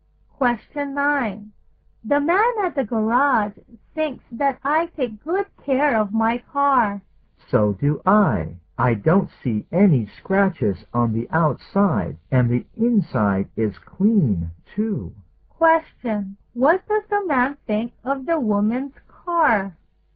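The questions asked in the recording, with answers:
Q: What does the man think of the woman's car?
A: It is well cared for, clean inside and out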